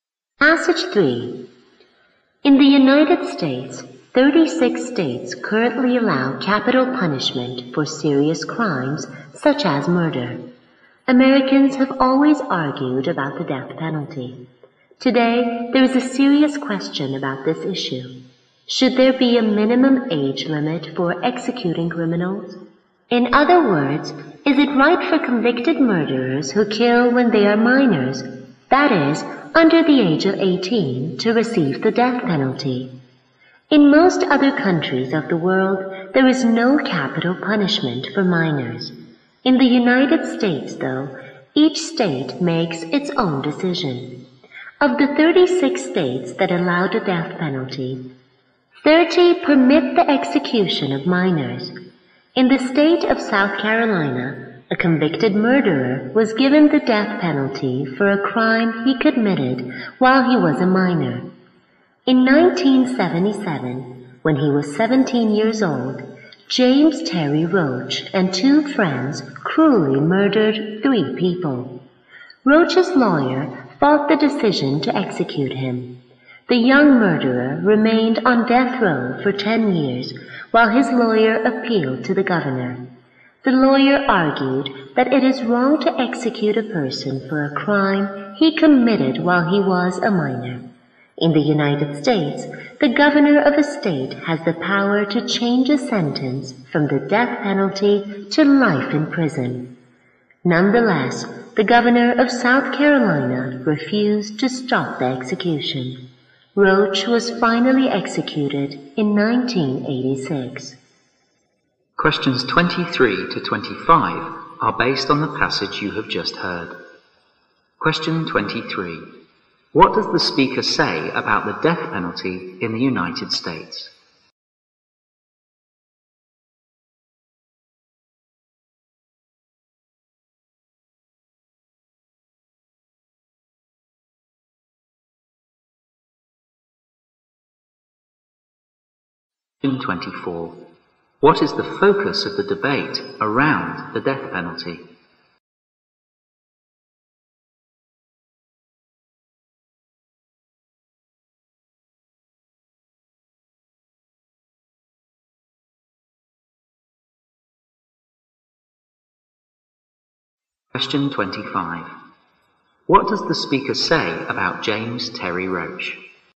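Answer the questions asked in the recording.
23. Each state decides; 36 states allow it
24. Whether there should be a minimum age for execution
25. He was executed in 1986 for murders committed at 17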